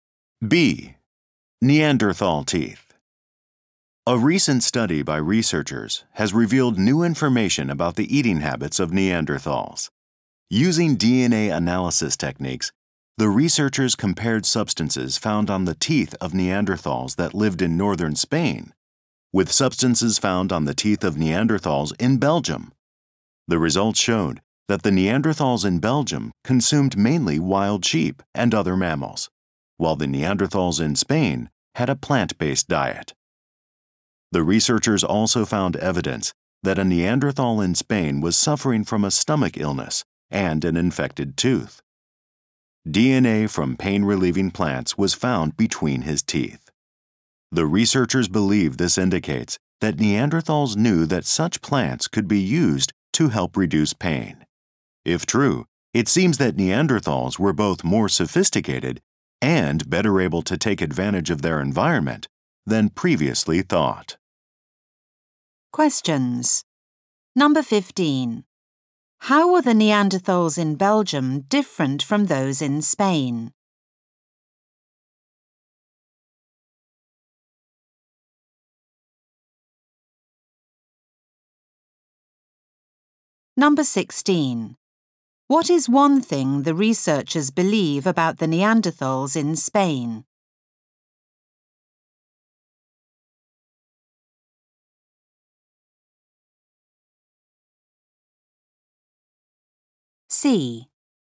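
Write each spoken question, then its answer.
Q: How were the Neanderthals in Belgium different from those in Spain?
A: They ate mainly wild sheep and other mammals rather than plants

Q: What is one thing the researchers believe about the Neanderthals in Spain?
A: They knew plants could be used to reduce pain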